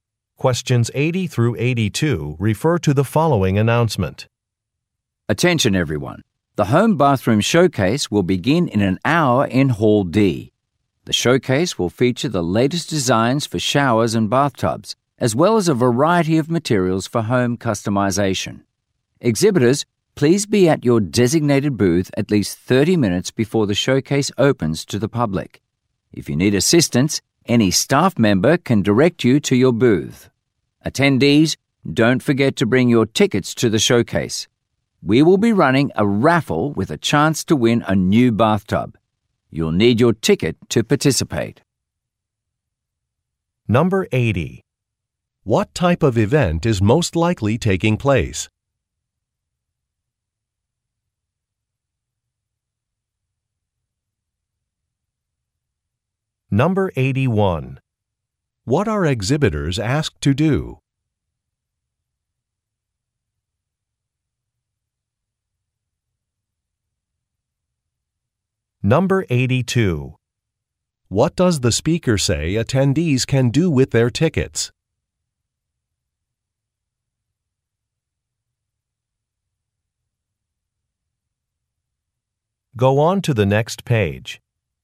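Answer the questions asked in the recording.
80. A home bathroom design showcase
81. Be at their booths at least 30 minutes before the showcase opens
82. Enter a raffle to win a new bathtub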